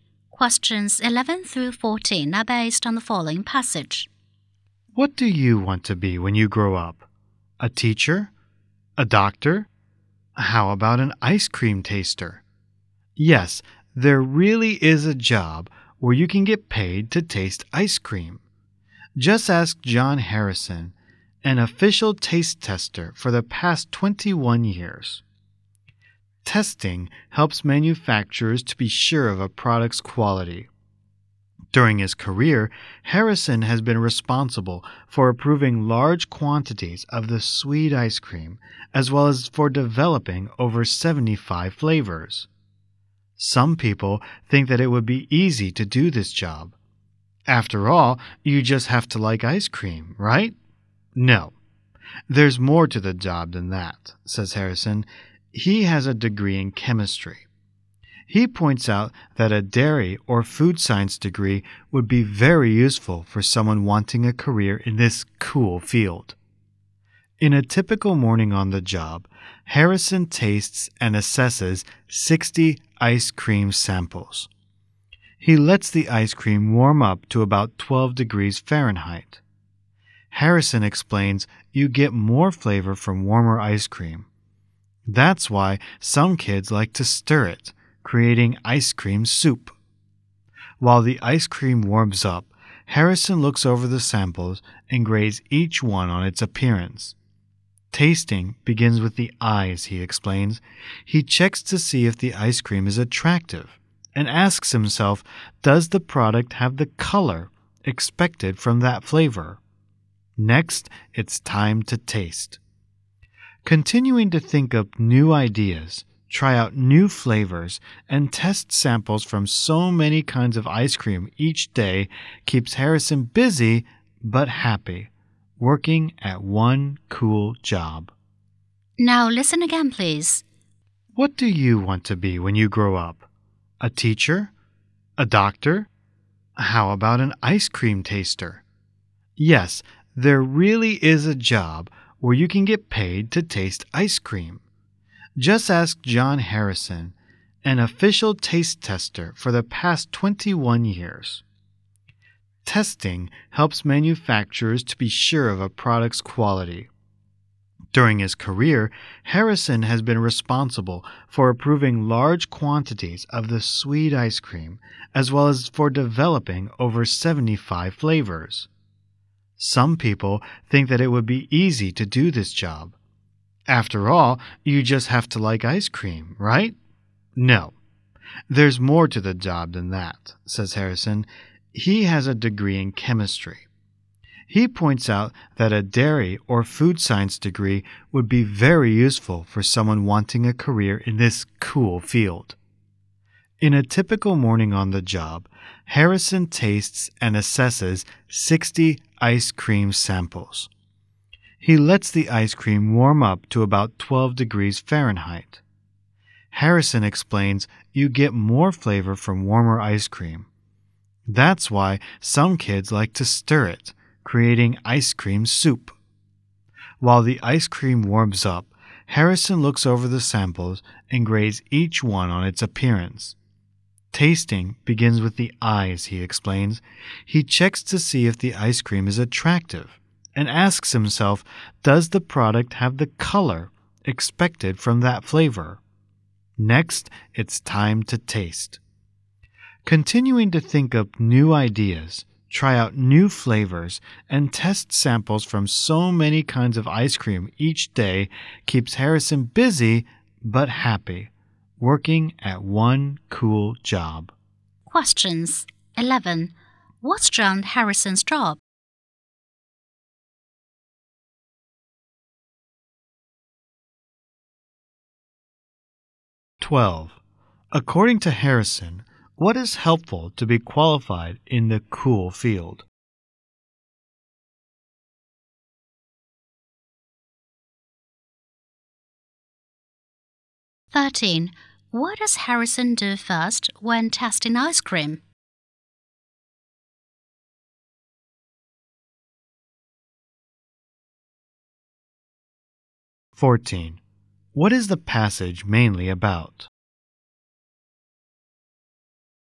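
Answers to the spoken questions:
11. Ice cream taster
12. A dairy or food science degree
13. Lets it warm up and checks its appearance
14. The job of an ice cream taster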